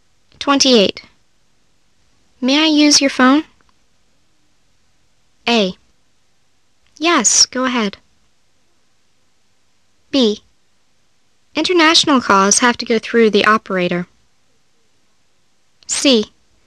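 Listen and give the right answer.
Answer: A: Yes, go ahead.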